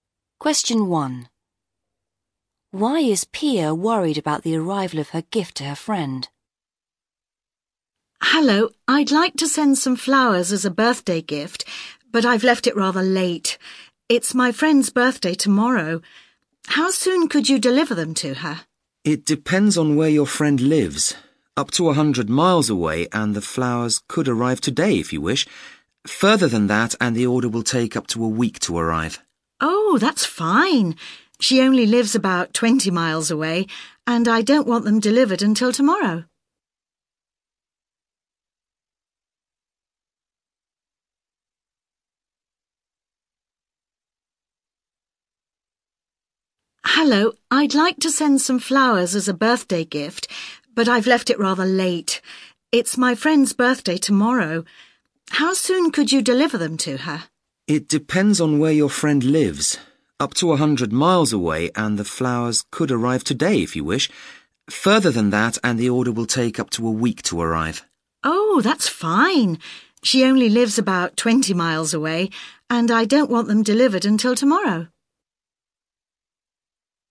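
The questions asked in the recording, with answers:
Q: Why is Pia worried about the arrival of her gift to her friend?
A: She has left it late: her friend's birthday is tomorrow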